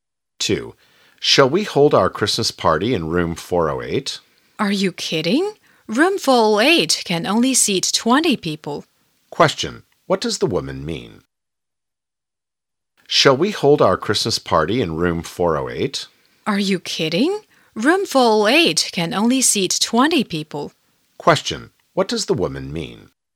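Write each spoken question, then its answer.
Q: What does the woman mean?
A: Room 408 is too small for the party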